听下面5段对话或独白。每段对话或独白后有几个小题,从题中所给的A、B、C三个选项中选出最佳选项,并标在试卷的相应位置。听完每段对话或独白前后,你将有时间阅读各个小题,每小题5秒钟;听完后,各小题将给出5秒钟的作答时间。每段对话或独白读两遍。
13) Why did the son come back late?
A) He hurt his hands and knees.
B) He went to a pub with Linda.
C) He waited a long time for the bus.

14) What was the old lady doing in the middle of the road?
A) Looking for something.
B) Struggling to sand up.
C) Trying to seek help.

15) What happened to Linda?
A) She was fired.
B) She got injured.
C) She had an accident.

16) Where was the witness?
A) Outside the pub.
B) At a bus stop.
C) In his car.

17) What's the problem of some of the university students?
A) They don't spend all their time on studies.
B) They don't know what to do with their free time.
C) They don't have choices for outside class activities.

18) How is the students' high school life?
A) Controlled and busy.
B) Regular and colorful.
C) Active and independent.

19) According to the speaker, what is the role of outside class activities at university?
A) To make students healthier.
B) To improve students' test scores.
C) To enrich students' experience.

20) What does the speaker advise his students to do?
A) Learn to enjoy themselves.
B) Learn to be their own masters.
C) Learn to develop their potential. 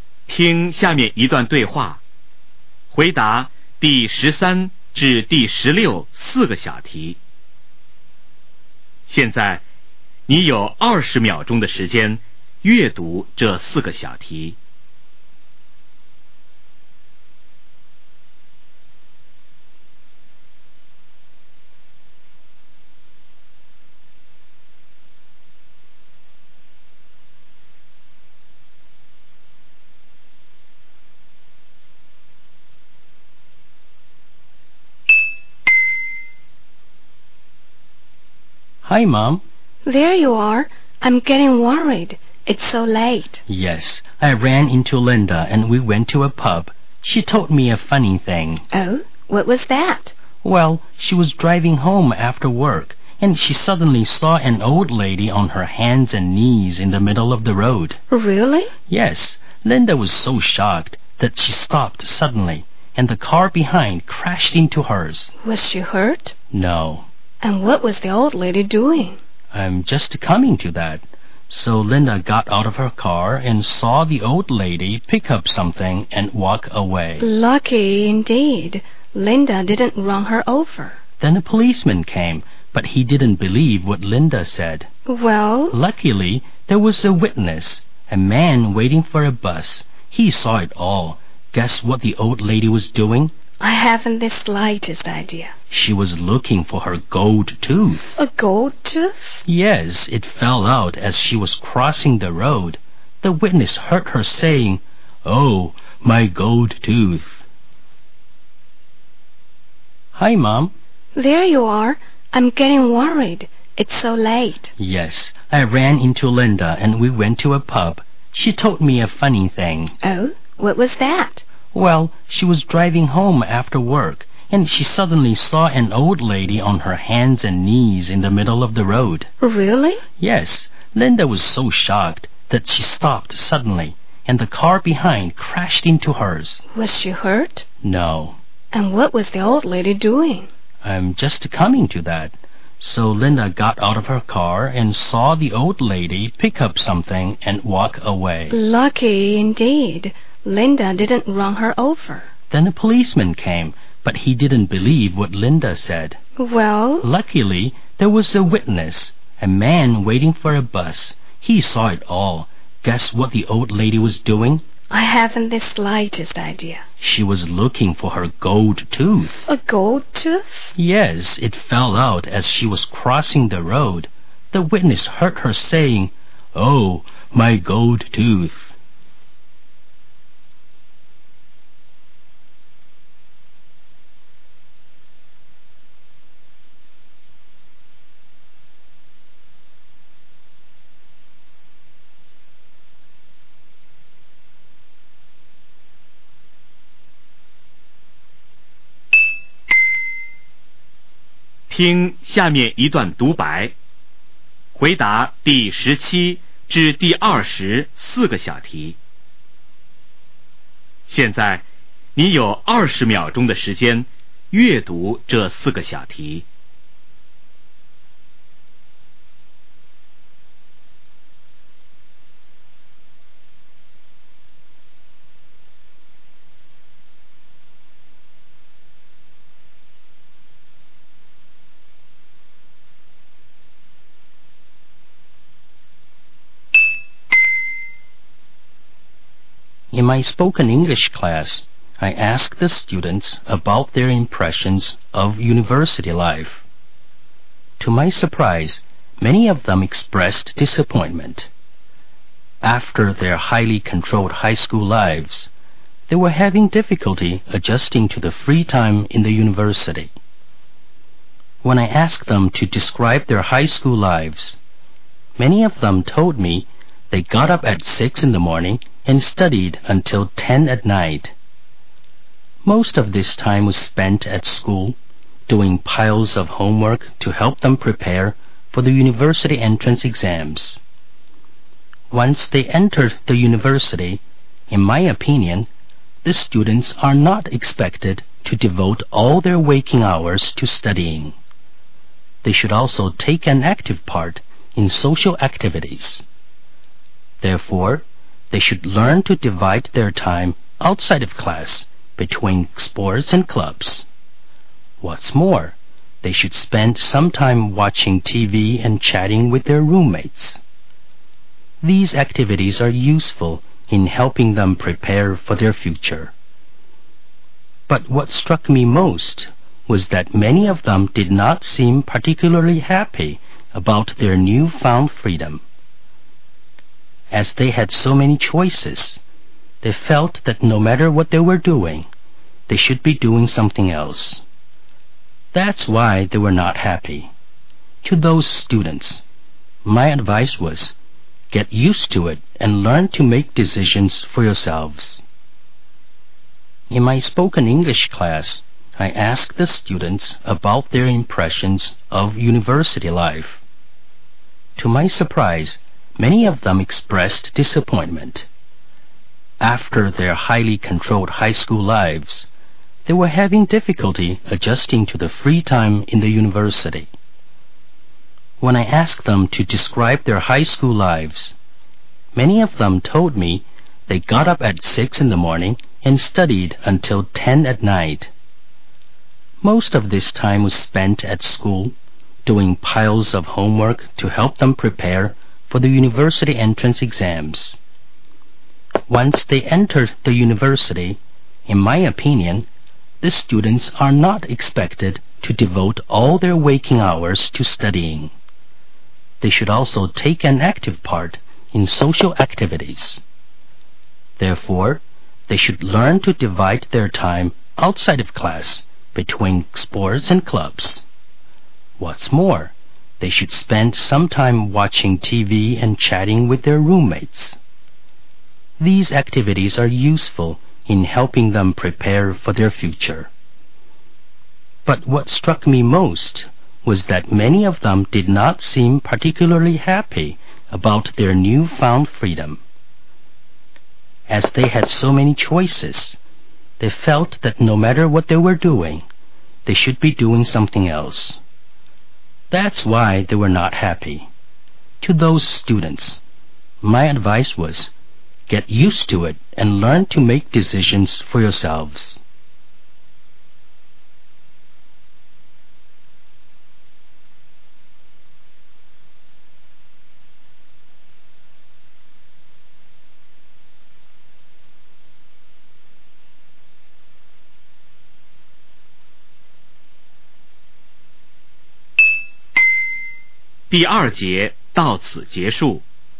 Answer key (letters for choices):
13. B
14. A
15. C
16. B
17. B
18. A
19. C
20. B